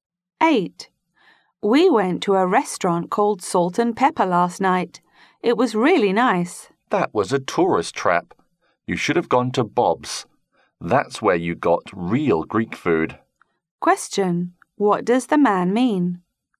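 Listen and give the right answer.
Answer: Bob's is better; Salt and Pepper is a tourist trap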